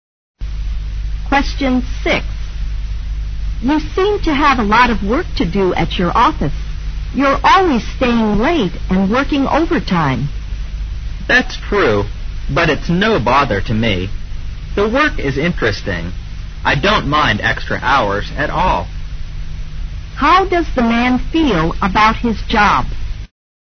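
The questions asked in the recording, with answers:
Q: How does the man feel about his job?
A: He finds it interesting and doesn't mind the extra hours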